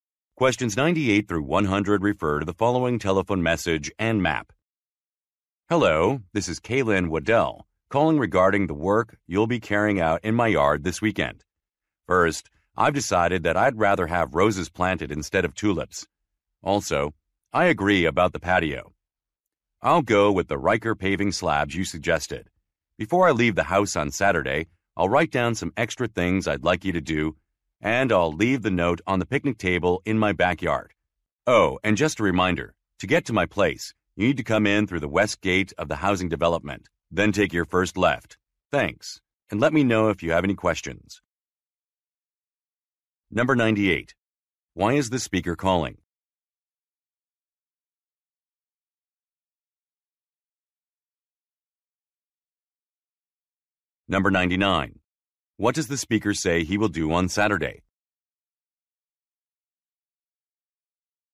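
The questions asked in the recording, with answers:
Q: Why is the speaker calling?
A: To change details of the yard work

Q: What does the speaker say he will do on Saturday?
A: Leave a note on the picnic table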